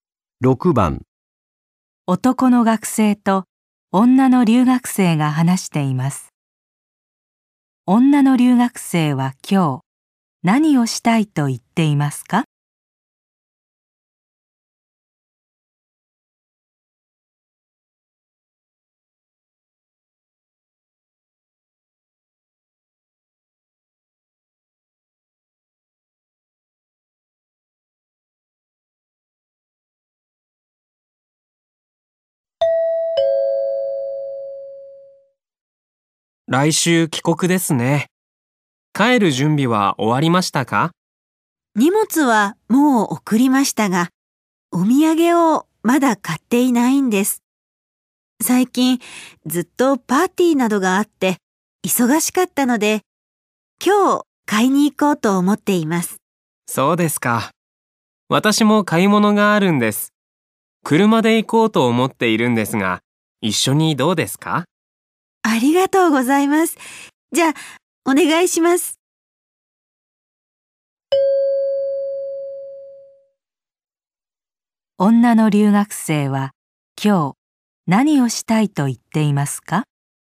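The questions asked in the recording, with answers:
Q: 女の留学生は、今日、何をしたいと言っていますか?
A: お土産を買いに行きたい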